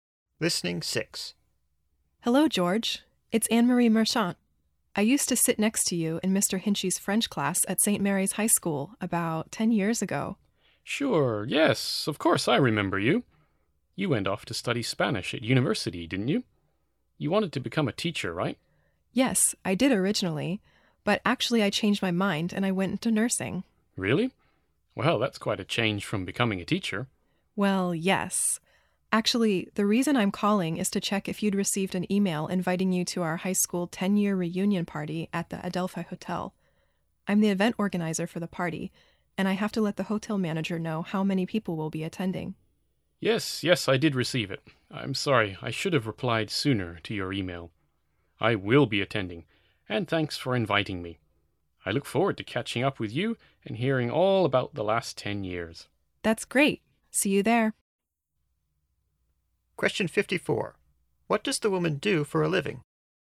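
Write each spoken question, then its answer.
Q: What does the woman do for a living?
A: She is a nurse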